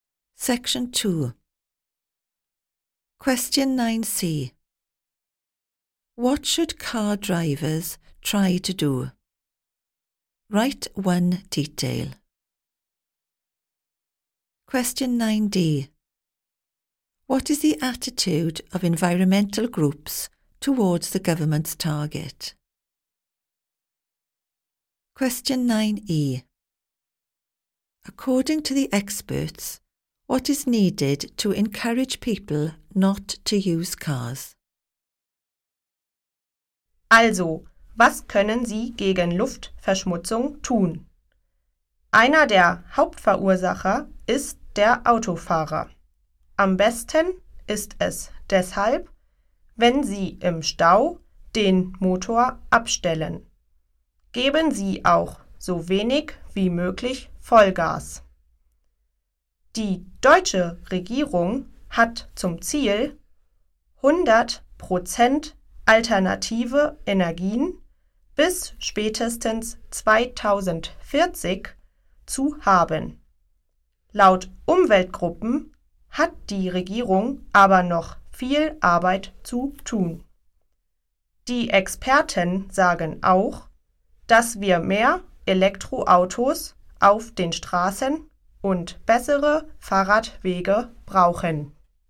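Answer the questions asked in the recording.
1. Switch off the engine in traffic jams / accelerate as little as possible
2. The government still has a lot of work to do
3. More electric cars and better cycle paths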